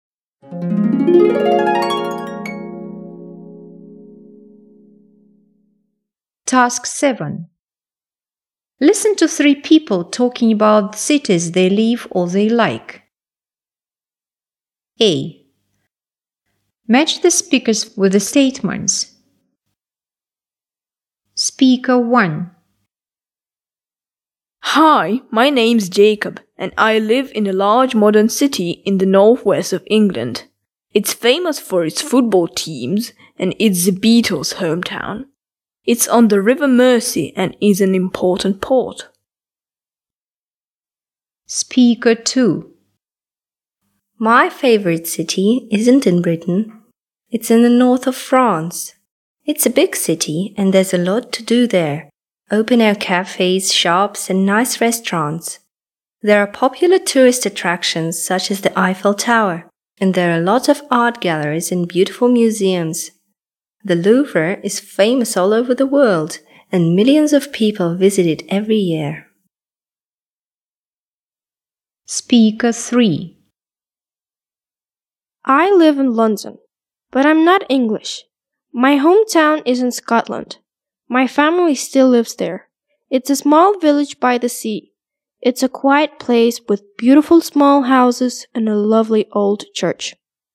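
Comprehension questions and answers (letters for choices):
Task 7. Listen to three people talking about cities they like or live in. Match the speakers with the statements:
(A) This person's parents live in a quiet city.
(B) There are plenty of things to see and do in this city.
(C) A famous music band iived there.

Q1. Speaker 1.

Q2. spea er2 .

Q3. Speaker 3.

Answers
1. C
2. B
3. A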